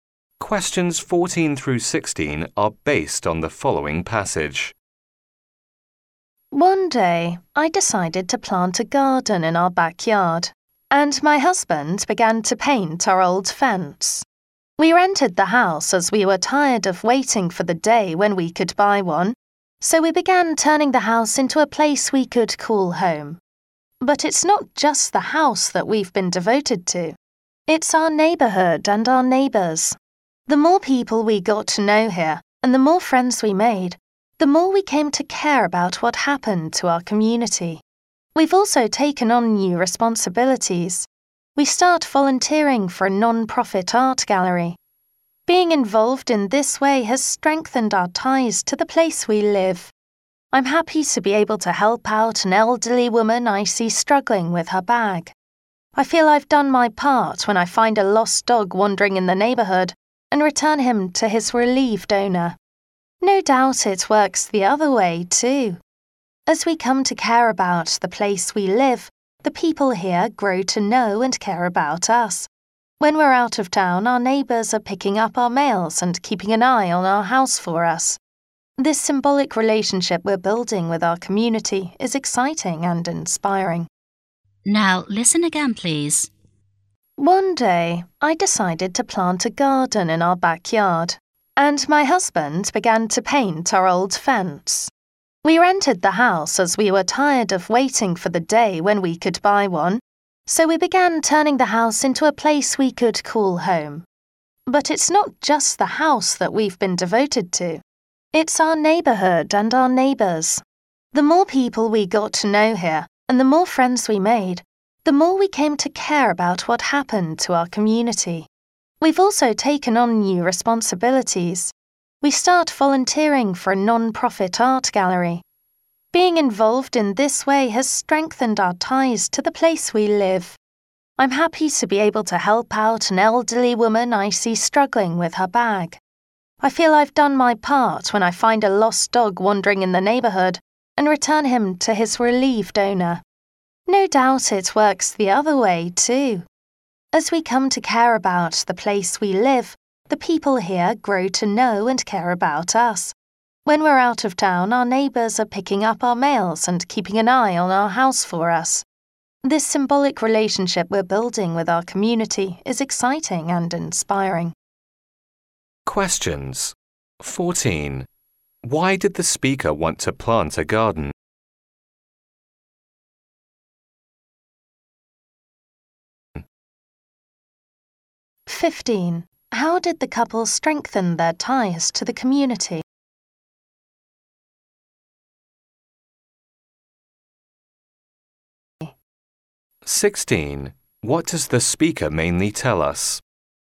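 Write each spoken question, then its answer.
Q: Why did the speaker want to plant a garden?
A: To turn the rented house into a home

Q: How did the couple strengthen their ties to the community?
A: By volunteering and helping neighbours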